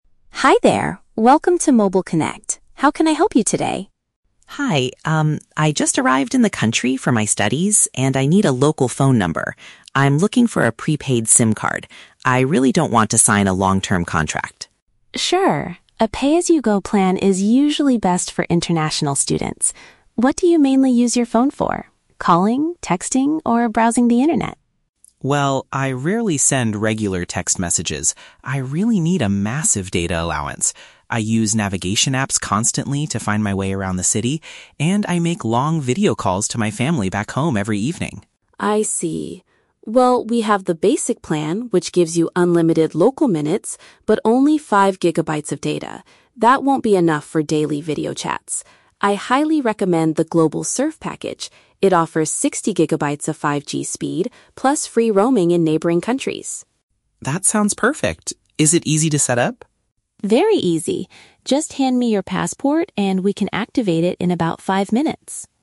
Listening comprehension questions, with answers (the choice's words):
Listen to the conversation between an international student and a telecom store clerk. Read the questions below and choose the correct answer (A, B, or C) for each.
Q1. Why does the student prefer a prepaid phone plan?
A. He wants to avoid committing to a lengthy legal agreement.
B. He wants to make unlimited local phone calls to his friends.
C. He cannot afford the high monthly costs of regular packages.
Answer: He wants to avoid committing to a lengthy legal agreement.

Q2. What is the main reason the student needs a large data allowance?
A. To stream high-definition movies on the internet every evening.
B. To get digital directions and communicate visually with his relatives.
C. To send hundreds of text messages to his university classmates.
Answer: To get digital directions and communicate visually with his relatives.

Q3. Why does the clerk advise against the "Basic Plan"?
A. The internet connection speed is generally too slow for smartphones.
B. It requires the user to frequently travel to neighboring countries.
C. It does not provide enough internet capacity for the student's habits.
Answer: It does not provide enough internet capacity for the student's habits.

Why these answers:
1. The student states he wants a prepaid SIM card because "I really don't want to sign a long-term contract." (Paraphrased: long-term contract = lengthy legal agreement). The Trap: Option (B) is incorrect. The clerk mentions "unlimited local minutes" later when describing the Basic Plan, but this is not the student's goal. Not mentioned: Option (C) is a plausible reason for choosing prepaid, but the student never mentions his budget or being unable to afford regular packages.
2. The student explains he needs data because he uses "navigation apps" to find his way, and makes "video calls to my family." (Paraphrased: navigation apps = digital directions; video calls = communicate visually; family = relatives). The Trap: Option (C) is incorrect because the student explicitly says, "I rarely send regular text messages." Not mentioned: Option (A) is a common use for high data, but streaming movies is never mentioned in the audio.
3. The clerk says the Basic Plan only gives "5 gigabytes of data" and warns that "That won't be enough for daily video chats." (Paraphrased: 5 gigabytes won't be enough = does not provide enough internet capacity). The Trap: Option (B) uses the phrase "neighboring countries", but this is a feature of the Global Surf package, not the Basic Plan. Not mentioned: Option (A) is a trap. The clerk says the amount of data (capacity) is too low, not that the speed of the Basic Plan is too slow.

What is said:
Clerk: Hi there, welcome to Mobile Connect. How can I help you today?
Student: Hi, um, I just arrived in the country for my studies, and I need a local phone number. I'm looking for a prepaid SIM card. I really don't want to sign a long-term contract.
Clerk: Sure, a pay-as-you-go plan is usually best for international students. What do you mainly use your phone for? Calling, texting, or browsing the internet?
Student: Well, I rarely send regular text messages. I really need a massive data allowance. I use navigation apps constantly to find my way around the city, and I make long video calls to my family back home every evening.
Clerk: I see. Well, we have the "Basic Plan" which gives you unlimited local minutes, but only 5 gigabytes of data. That won't be enough for daily video chats. I highly recommend the "Global Surf" package. It offers 60 gigabytes of 5G speed, plus free roaming in neighboring countries.
Student: That sounds perfect. Is it easy to set up?
Clerk: Very easy. Just hand me your passport, and we can activate it in about five minutes.